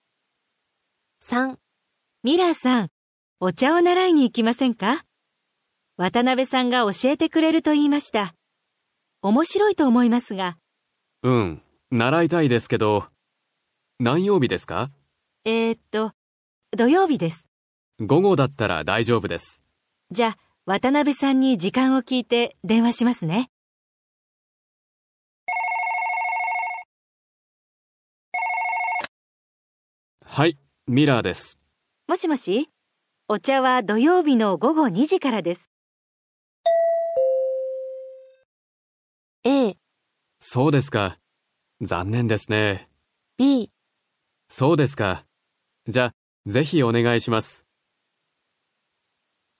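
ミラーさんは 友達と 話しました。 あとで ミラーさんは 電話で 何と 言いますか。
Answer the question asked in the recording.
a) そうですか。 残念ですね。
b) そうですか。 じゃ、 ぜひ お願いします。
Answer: b) そうですか。 じゃ、 ぜひ お願いします。

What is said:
B: ミラーさん、 お茶を 習いに 行きませんか。 渡辺さんが 教えてくれると言いました。 おもしろいと 思いますが...。
A: うん、 習いたいですけど...。 何曜日ですか。 B: えーと、 土曜日です。
A: 午後だったら、 大丈夫です。
B: じゃ、 渡辺さんに 時間を 聞いて、 電話しますね。
A: はい、 ミラーです。
B: もしもし、 お茶は 土曜日の 午後2時からです。
A: a. そうですか。 残念ですね。

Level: N5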